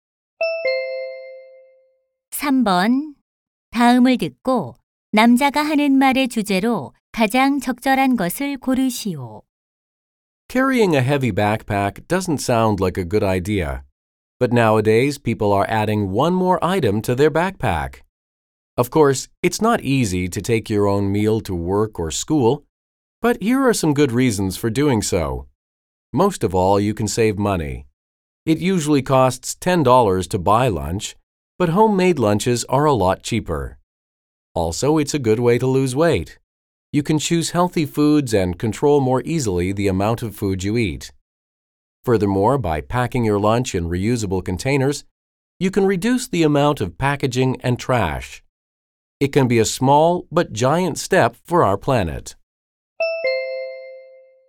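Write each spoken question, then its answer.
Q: 다음을 듣고 남자가 하는 말의 주제로 가장 적절한 것을 고르시오.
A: 도시락을 싸 가는 것의 장점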